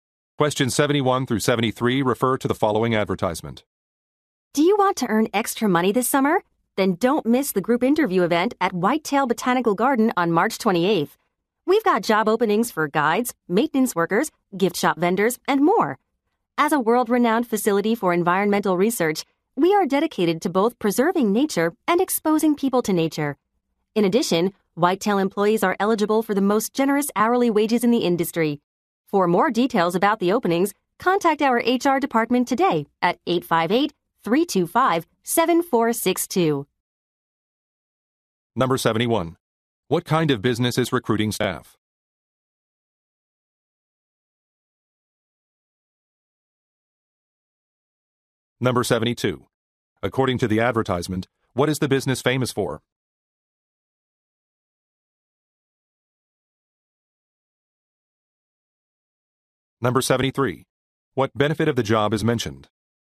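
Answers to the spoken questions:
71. A botanical garden
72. Environmental research
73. Generous hourly wages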